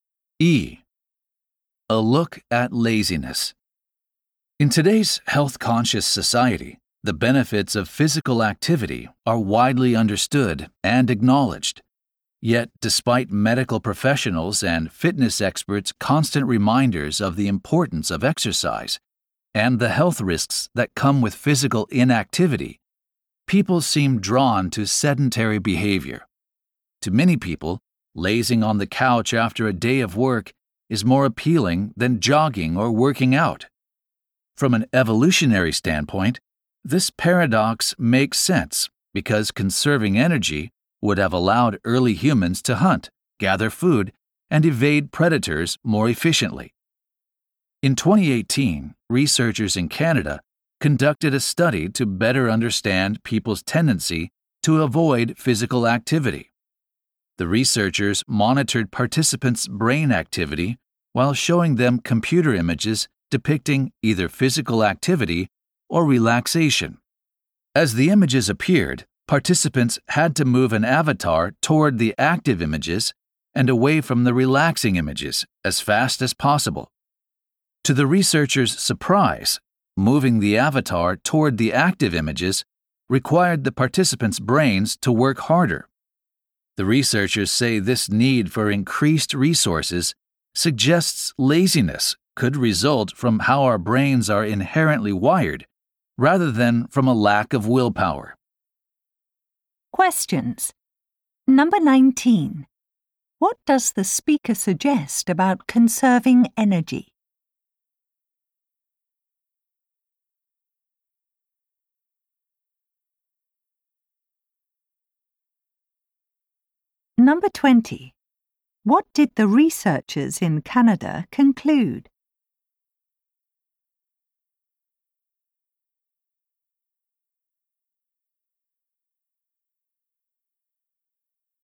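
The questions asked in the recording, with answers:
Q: What does the speaker suggest about conserving energy?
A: It helped early humans hunt, gather food and escape predators.

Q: What did the researchers in Canada conclude?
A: Laziness may come from how our brains are wired, not from a lack of willpower.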